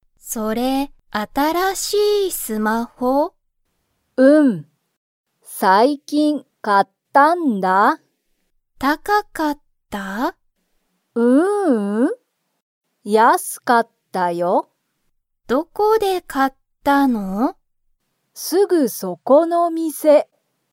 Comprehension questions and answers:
そのスマホは、高(たか)かったですか?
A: いいえ

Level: Level 1